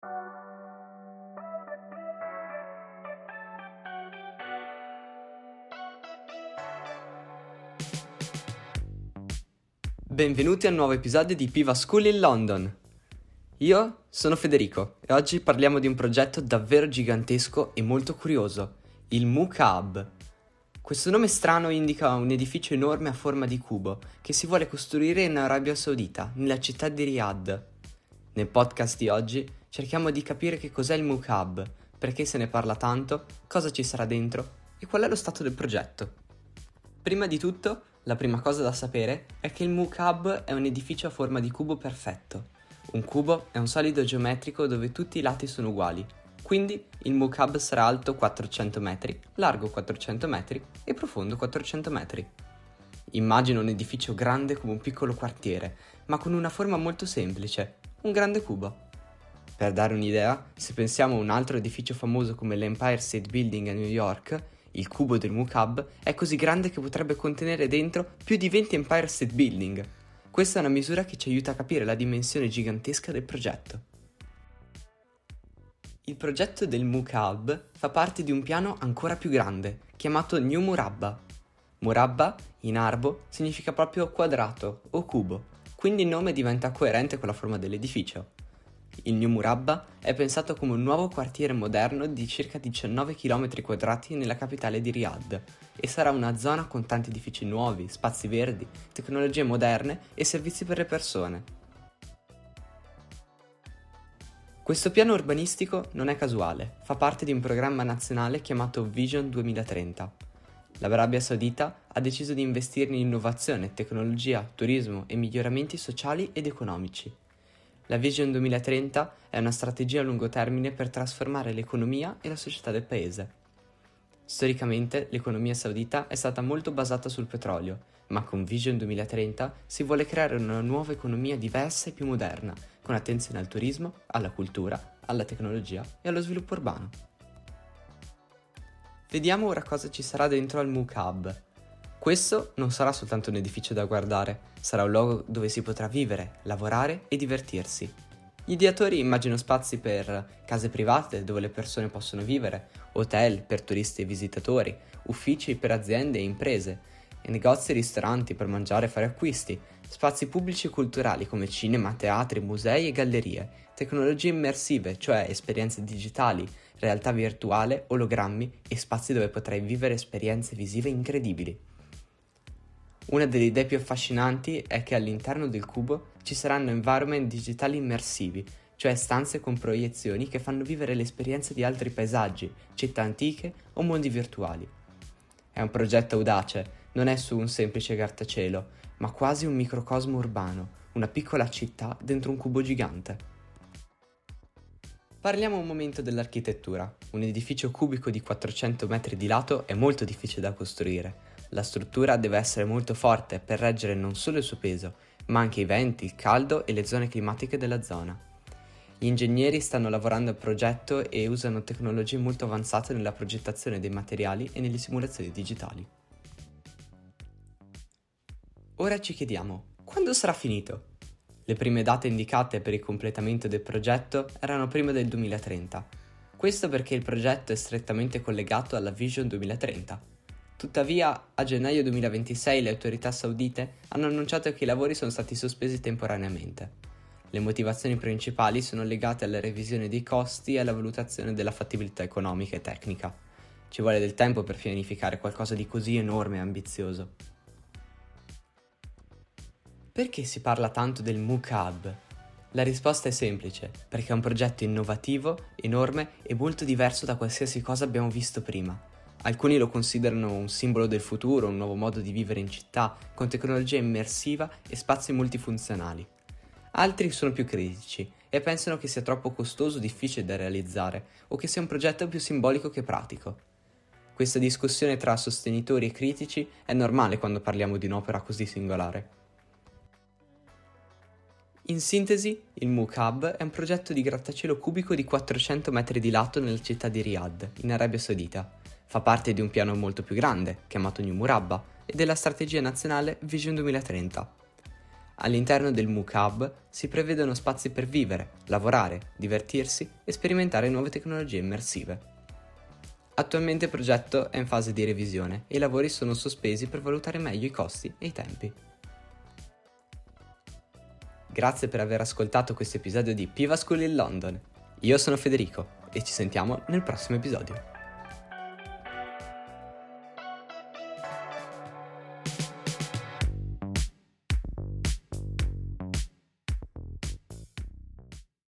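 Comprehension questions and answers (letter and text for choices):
Scegli la parola giusta:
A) cubo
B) Riyadh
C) tecnologia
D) 400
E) turismo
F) sospesi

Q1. Il Mukaab ha la forma di un ______.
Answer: A) cubo

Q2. La città è ______.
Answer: B) Riyadh

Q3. L'edificio è alto ______ metri.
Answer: D) 400

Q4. Il progetto usa molta ______ moderna.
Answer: C) tecnologia

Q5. Vision 2030 vuole sviluppare anche il ______.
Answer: E) turismo

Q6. I lavori sono stati ______ temporaneamente.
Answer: F) sospesi

Scrivi V (vero) o F (falso).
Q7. Il Mukaab è un edificio rotondo.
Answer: F

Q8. Si trova a Riyadh.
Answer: V

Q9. Dentro il Mukaab ci saranno solo uffici.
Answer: F

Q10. Fa parte del progetto New Murabba.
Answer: V

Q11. Il progetto è collegato alla Vision 2030.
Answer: V

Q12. Il Mukaab è alto 40 metri.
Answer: F

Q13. Ci saranno tecnologie digitali immersive.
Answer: V

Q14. Tutti pensano che il progetto sia perfetto.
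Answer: F

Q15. Che cos'è il Mukaab?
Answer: Un enorme edificio a forma di cubo

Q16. In quale paese si trova il progetto del Mukaab?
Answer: Arabia Saudita

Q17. In quale città sarà costruito?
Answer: Riyadh

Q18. Che forma ha l'edificio?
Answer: Cubo

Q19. Quanto è alto il Mukaab?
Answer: 400 metri

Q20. Di quale progetto più grande fa parte il Mukaab?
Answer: New Murabba

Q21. Che cos'è la Vision 2030?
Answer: Una strategia a lungo termine per trasformare l'economia e la società del paese

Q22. Quali spazi ci saranno dentro il Mukaab? Nomina almeno tre esempi.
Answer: Case private, hotel, uffici, negozi e ristoranti, cinema, teatri, musei

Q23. Perché alcune persone criticano il progetto?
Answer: Pensano che sia troppo costoso o difficile da realizzare, o più simbolico che pratico

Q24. I lavori del Mukaab sono finiti o sono stati sospesi?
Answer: Sono stati sospesi temporaneamente

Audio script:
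Podcaster: Federico
Benvenuti al nuovo episodio di PivaSchool in London! Io sono Federico e oggi parliamo di un progetto davvero gigantesco e molto curioso: il Mukaab. Questo nome strano indica un edificio enorme a forma di cubo, che si vuole costruire in Arabia Saudita nella città di Riyadh. Nel podcast di oggi cerchiamo di capire che cosa è il Mukaab, perché se ne parla tanto, cosa ci sarà dentro e qual è lo stato del progetto.
Prima di tutto, la prima cosa da sapere è che il Mukaab è un edificio a forma di cubo perfetto. Un cubo è un solido geometrico dove tutti i lati sono uguali: quindi il Mukaab sarà alto 400 metri, largo 400 metri e profondo 400 metri. Immagina un edificio grande come un piccolo quartiere, ma con una forma molto semplice: un grande cubo. Per dare un'idea, se pensiamo a un altro edificio famoso come l'Empire State Building a New York, il cubo del Mukaab è così grande che potrebbe contenere dentro più di venti Empire State Building! 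Questa è una misura che ci aiuta a capire la dimensione gigantesca del progetto.
Il progetto del Mukaab fa parte di un piano ancora più grande, chiamato New Murabba. "Murabba" in arabo significa proprio "quadrato" o "cubo", quindi il nome diventa coerente con la forma dell'edificio. Il New Murabba è pensato come un nuovo quartiere moderno di circa 19 chilometri quadrati nella capitale Riyadh, e sarà una zona con tanti edifici nuovi, spazi verdi, tecnologie moderne e servizi per le persone.
Questo piano urbanistico non è casuale. Fa parte di un programma nazionale chiamato Vision 2030. L'Arabia Saudita ha deciso di investire in innovazione, tecnologia, turismo e miglioramenti sociali ed economici. La Vision 2030 è una strategia a lungo termine per trasformare l'economia e la società del paese. Storicamente, l'economia saudita è stata molto basata sul petrolio, ma con Vision 2030 si vuole creare una nuova economia diversa e più moderna, con attenzione al turismo, alla cultura, alla tecnologia e allo sviluppo urbano.
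Questo non sarà soltanto un edificio da guardare; sarà un luogo dove si potrà vivere, lavorare e divertirsi. Gli ideatori immaginano spazi per:
• Case private, dove le persone possono vivere;
• Hotel, per turisti e visitatori;
• Uffici, per aziende e impresa;
• Negozi e ristoranti, per mangiare e fare acquisti;
• Spazi pubblici e culturali, come cinema, teatri, musei e gallerie;
• Tecnologie immersive, cioè esperienze digitali, realtà virtuale ologrammi e spazi dove potrai vivere esperienze visive incredibili.
Una delle idee più affascinanti è che all'interno del cubo ci saranno environment digitali immersivi, cioè stanze con proiezioni che fanno vivere l'esperienza di altri paesaggi, città antiche o mondi virtuali. È un progetto audace: non è solo un semplice grattacielo, ma quasi un microcosmo urbano, una piccola città dentro un cubo gigante.
Parliamo un momento dell'architettura. Un edificio cubico di 400 metri di lato è molto difficile da costruire. 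La struttura deve essere molto forte per reggere non solo il suo peso, ma anche i venti, il caldo e le condizioni climatiche della zona. Gli ingegneri stanno lavorando al progetto e usano tecnologie molto avanzate nella progettazione dei materiali e nelle simulazioni digitali.
Ora ci chiediamo: quando sarà finito?
Le prime date indicate per il completamento del progetto erano prima del 2030. Questo perché il progetto è strettamente collegato alla Vision 2030. Tuttavia, a gennaio 2026 le autorità saudite hanno annunciato che i lavori sono stati sospesi temporaneamente. Le motivazioni principali sono legate alla revisione dei costi e alla valutazione della fattibilità economica e tecnica. Ci vuole tempo per pianificare qualcosa di così enorme e ambizioso.
Perché si parla tanto del Mukaab?
La risposta è semplice: perché è un progetto innovativo, enorme e molto diverso da qualsiasi cosa abbiamo visto prima. 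Alcuni lo considerano un simbolo del futuro, un nuovo modo di vivere in città, con tecnologia immersiva e spazi multifunzionali. Altri sono più critici e pensano che sia troppo costoso o difficile da realizzare, o che sia un progetto più simbolico che pratico. Questa discussione tra sostenitori e critici è normale quando parliamo di un'opera così singolare.
In sintesi, il Mukaab è un progetto di grattacielo cubico di 400 metri di lato nella città di Riyadh, in Arabia Saudita. Fa parte di un piano molto più grande chiamato New Murabba e della strategia nazionale Vision 2030. All'interno del Mukaab si prevedono spazi per vivere, lavorare, divertirsi e sperimentare nuove tecnologie immersive. Attualmente il progetto è in fase di revisione e i lavori sono sospesi per valutare meglio costi e tempi.
Grazie per aver ascoltato questo episodio di PivaSchool in London.
Io sono Federico e ci sentiamo nel prossimo episodio! 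🎧

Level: A2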